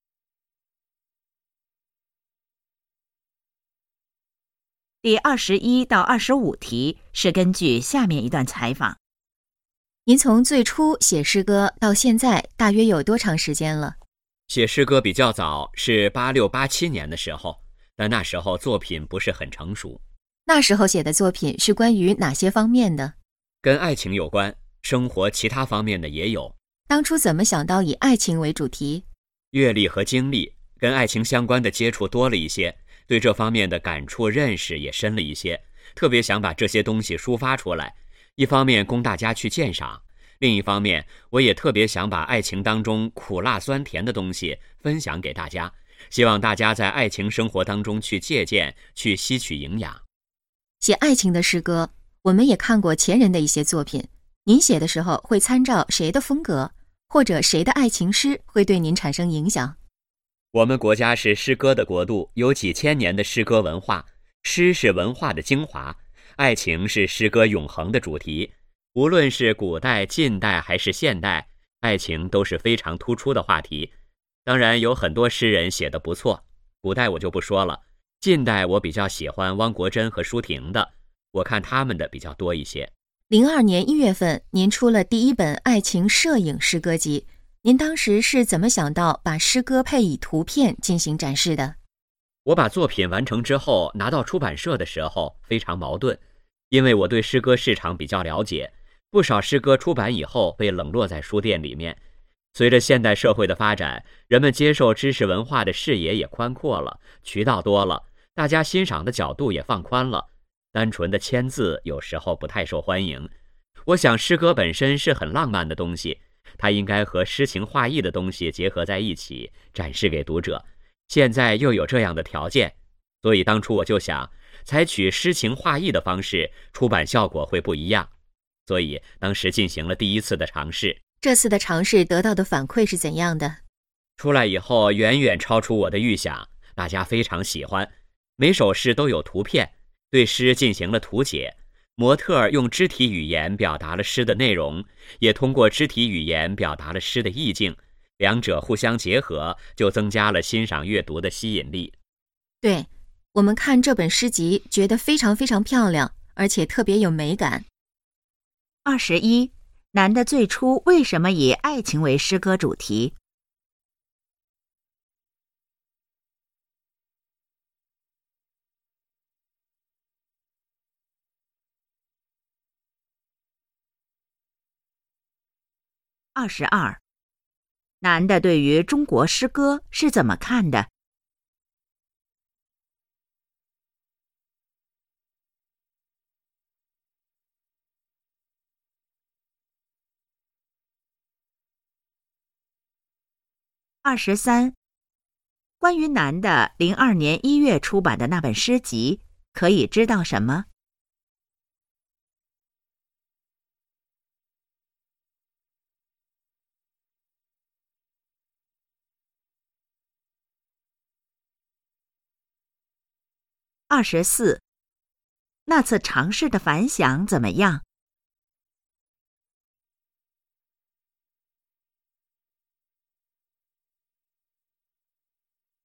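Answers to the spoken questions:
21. 接触爱情多,感触深,想抒发和分享
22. 中国是诗歌的国度,诗是文化的精华
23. 诗歌配有摄影图片
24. 远超预想,大家非常喜欢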